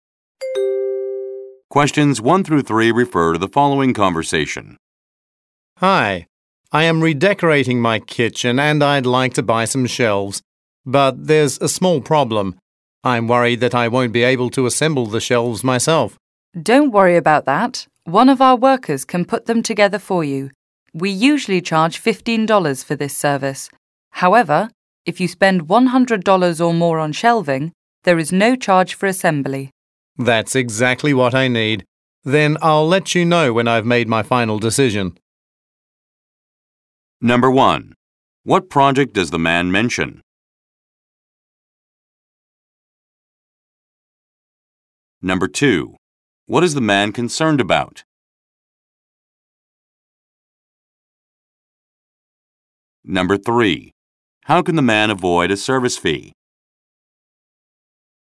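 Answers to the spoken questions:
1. Redecorating his kitchen
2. That he won't be able to assemble the shelves himself
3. By spending $100 or more on shelving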